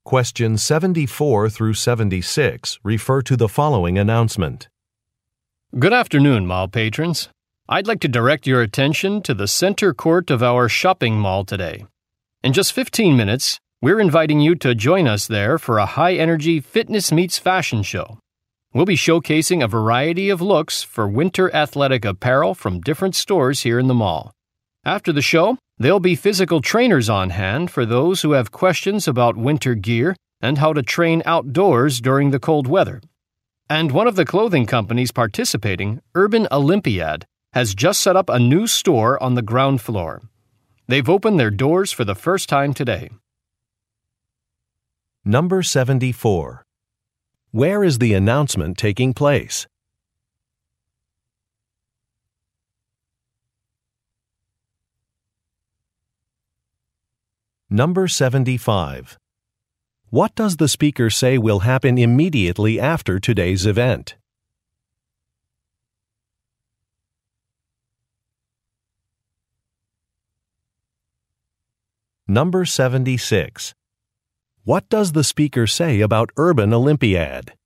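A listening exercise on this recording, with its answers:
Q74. Where is the announcement taking place?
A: At a shopping mall

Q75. What does the speaker say will happen immediately after today's event?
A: Trainers will provide consultations.

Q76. What does the speaker say about Urban Olympiad?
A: It is now officially open.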